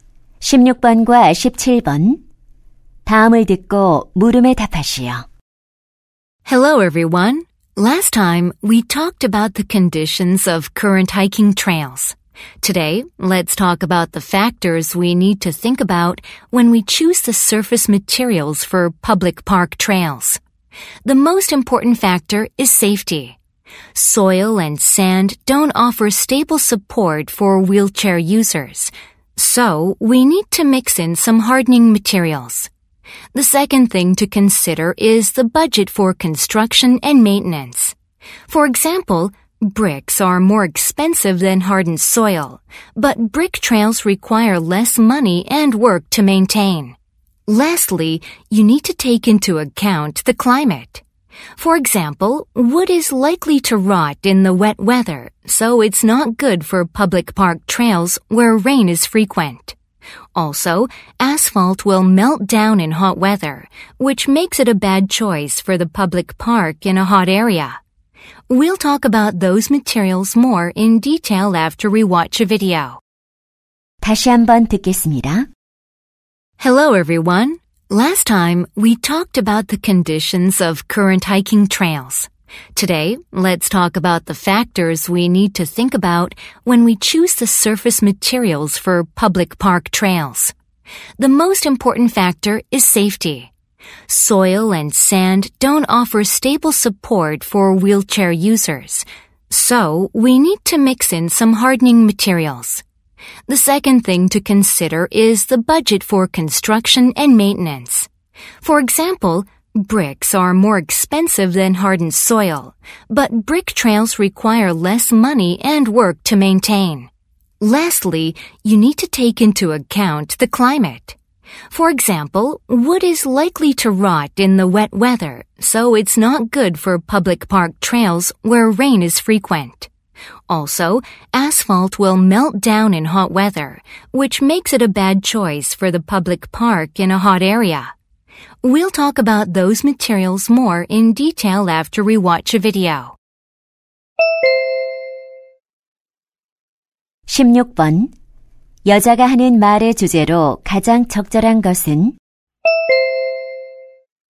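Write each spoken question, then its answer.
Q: 여자가 하는 말의 주제로 가장 적절한 것은?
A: 공원 산책로 표면 재료 선택 시 고려할 요인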